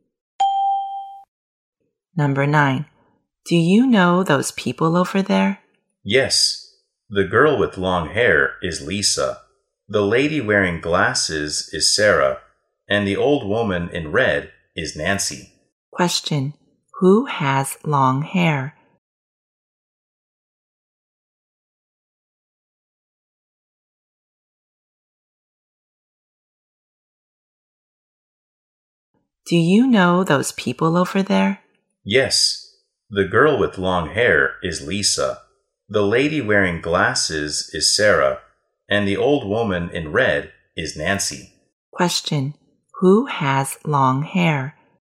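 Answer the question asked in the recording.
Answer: Lisa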